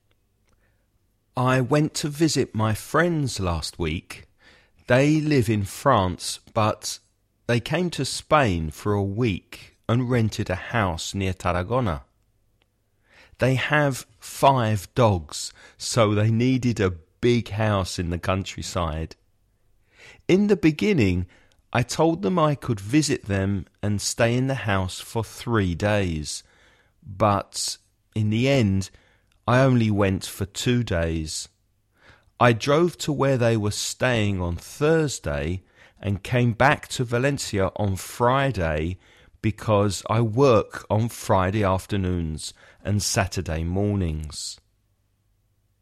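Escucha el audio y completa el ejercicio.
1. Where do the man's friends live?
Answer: In France

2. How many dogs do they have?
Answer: Five

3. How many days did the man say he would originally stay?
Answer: 3 days

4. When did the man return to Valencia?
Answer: On Friday

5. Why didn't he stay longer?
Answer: Because he works on Friday afternoons and Saturday mornings

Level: nivel básico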